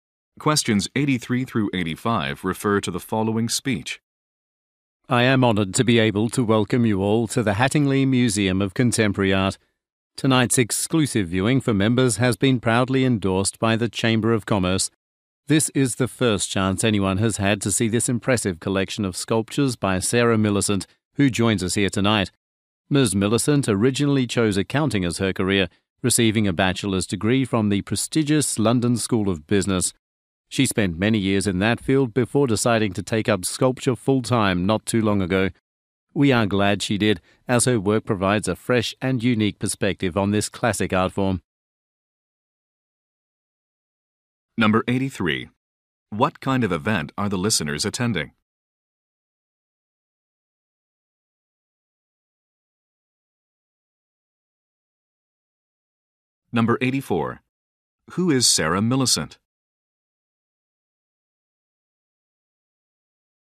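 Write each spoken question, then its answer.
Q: What kind of event are the listeners attending?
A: An exclusive members' viewing of a sculpture collection at a museum

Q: Who is Sarah Millicent?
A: A sculptor (formerly an accountant)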